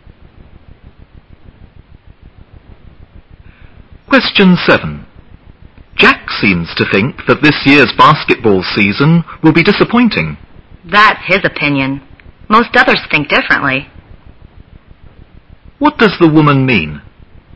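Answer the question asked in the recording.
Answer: Most people think the season won't be disappointing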